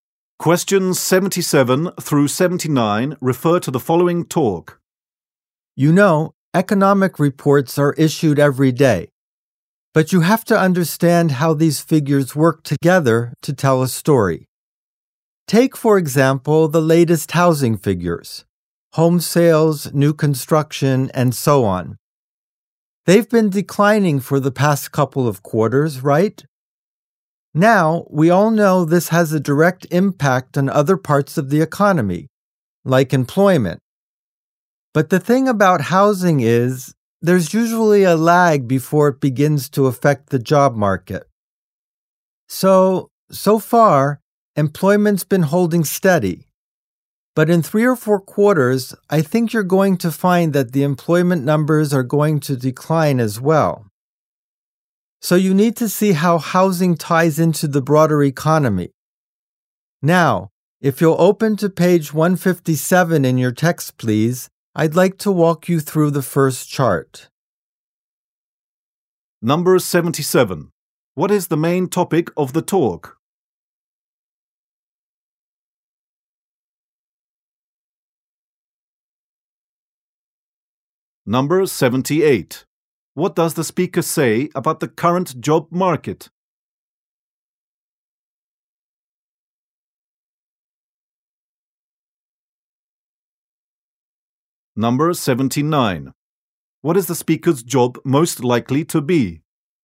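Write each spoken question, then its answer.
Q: What is the main topic of the talk?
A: How housing figures affect the wider economy

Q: What does the speaker say about the current job market?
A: Employment has been holding steady.

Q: What is the speaker's job most likely to be?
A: A teacher (of economics)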